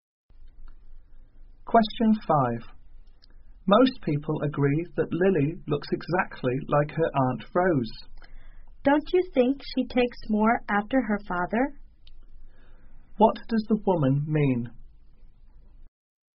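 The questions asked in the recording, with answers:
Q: What does the woman mean?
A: Lily looks more like her father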